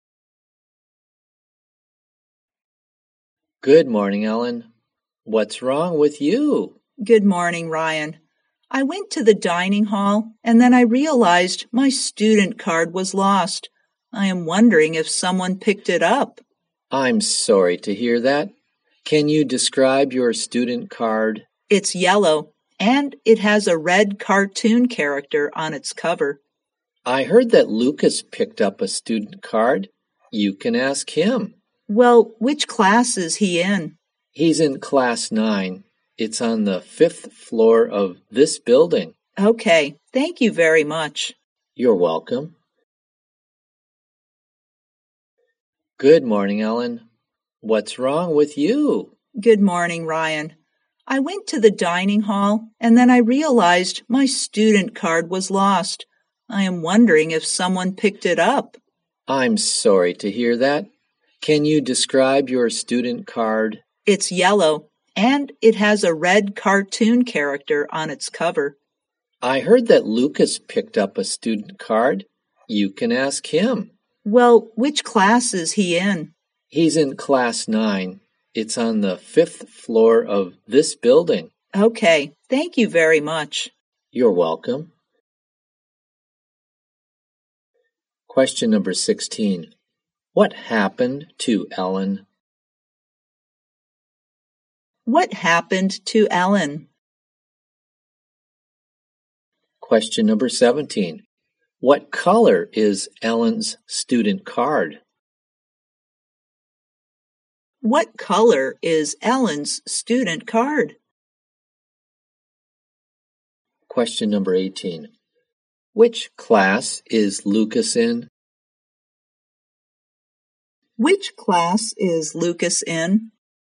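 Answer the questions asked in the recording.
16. She lost her student card
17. Yellow
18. Class 9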